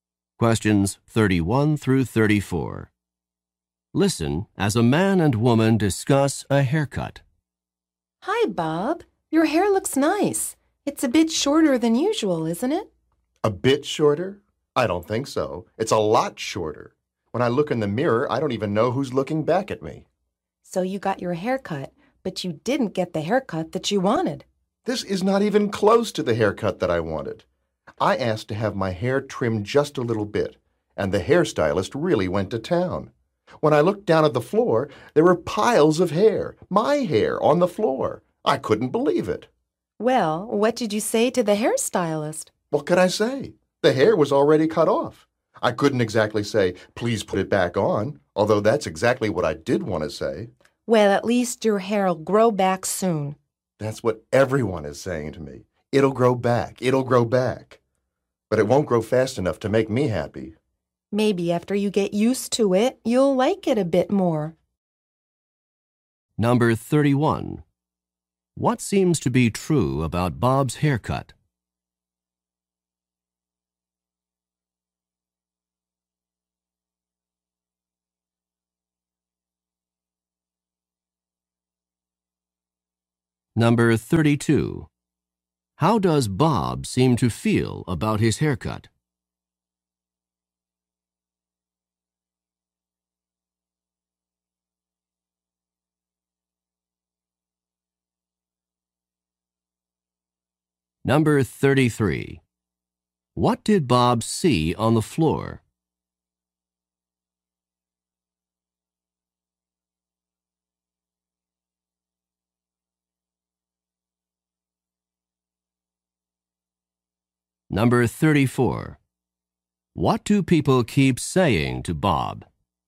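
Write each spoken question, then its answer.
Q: What did Bob see on the floor?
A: Piles of his hair

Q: What do people keep saying to Bob?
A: It'll grow back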